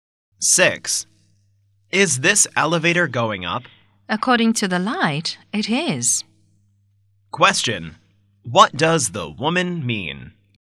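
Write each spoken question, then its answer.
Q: What does the woman mean?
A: The elevator is going up, according to the light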